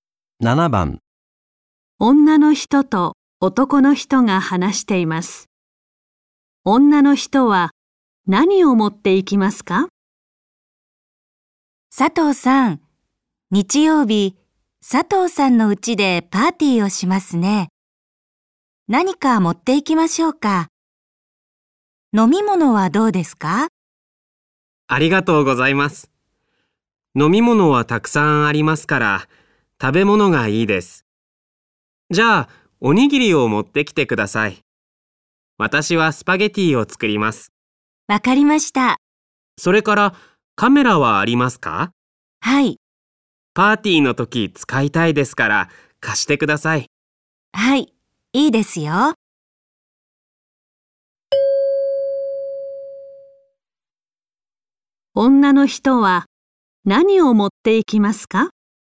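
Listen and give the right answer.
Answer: おにぎりとカメラ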